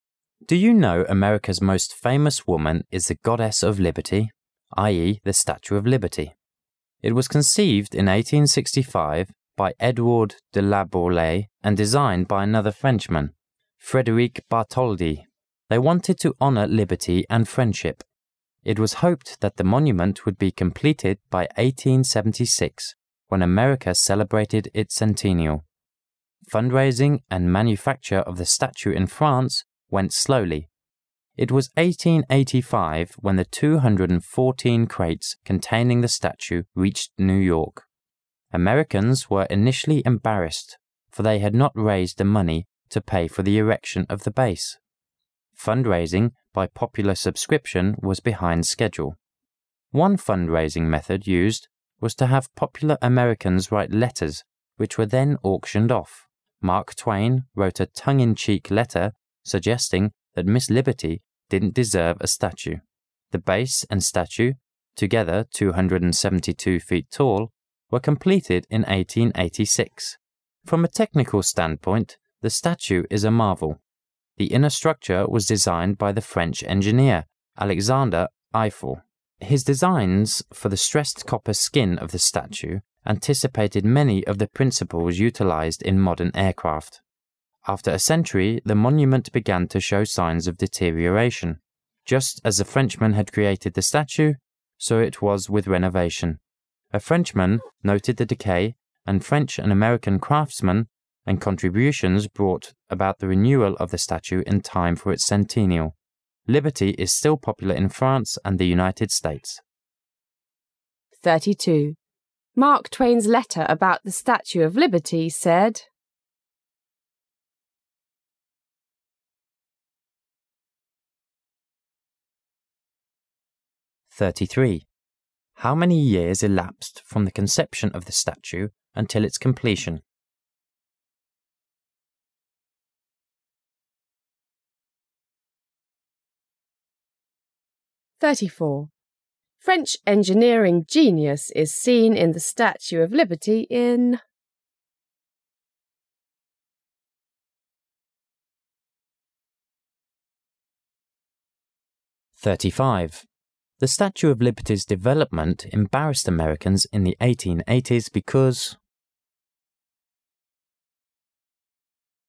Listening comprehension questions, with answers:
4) The Statue of Liberty's development embarrassed Americans in the 1880s because.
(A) they took so long to raise the money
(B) it was apparent the statue was mislocated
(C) its design was tasteless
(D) they felt that the concept was a waste of money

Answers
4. (A) they took so long to raise the money

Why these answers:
本题解题思路与33题相似。

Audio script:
[解析] 32-35 Do you know America's most famous woman is the Goddess of liberty, i. e., the Statue of Liberty? It was conceived in 1865 by Edouard de Laboulaye and designed by another Frenchman, Frederic Bartoldi. They wanted to honor liberty and friendship. It was hoped that the monument would be completed by 1876 when America celebrated its centennial. Fund raising and manufacture of the statue in France went slowly. It was 1885 when the 214 crates containing the statue reached New York. Americans were initially embarrassed for they had not raised the money to pay for the erection of the base. Fund raising by popular subscription was behind schedule. One fund raising method used was to have popular Americans write letters which were then auctioned of. Mark Twain wrote a "tongue in-cheek" letter suggesting that Miss Liberty didn't deserve a statue. The base and statue, together 272 feet tall, were completed in 1886. From a technical standpoint, the statue is a marvel. The inner structure was designed by the French engineer, Alexandre Eiffel. His designs for the stressed copper skin of the statue anticipated many of the principle utilized in modern aircraft. After a century, the monument began to show signs of deterioration. Just as Frenchmen had created the Statue, so it was with renovation. A Frenchman noted the decay and French and American craftsmen and contributions brought about the renewal of the Statue in time for its centennial. Liberty is still popular in France and the United States. Mark Twain's letter about the Statue of Liberty.

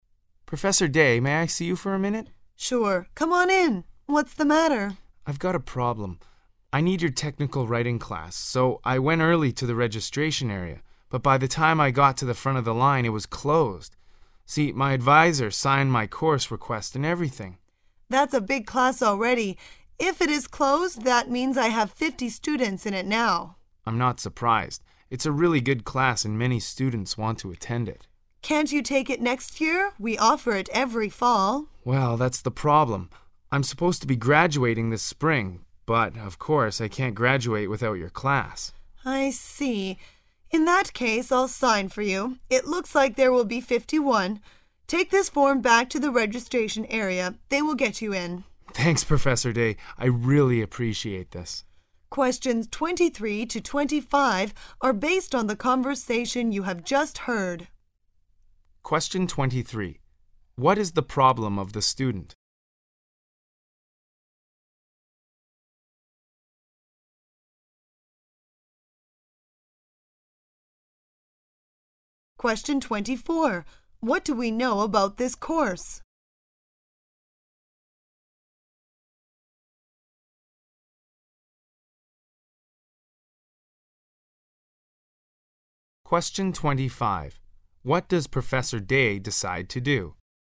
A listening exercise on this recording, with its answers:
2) What do we know about this course?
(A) Students attend it because it is required.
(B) The student likes the course very much.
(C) It is so popular that students line up to get registered.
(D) The professor offers the course every term.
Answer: (C) It is so popular that students line up to get registered.

